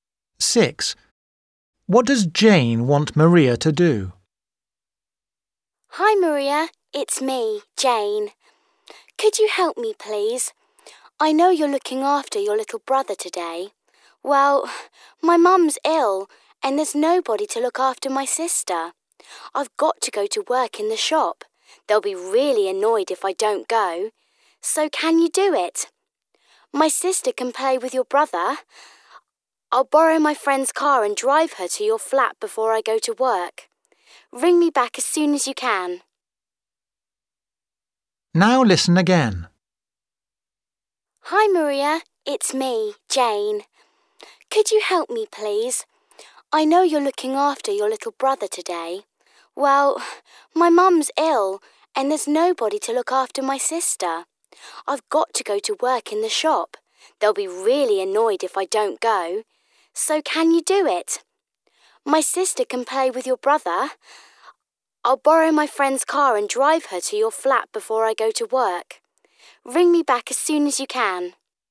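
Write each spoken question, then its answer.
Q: What does Jane want Maria to do?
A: look after Jane's sister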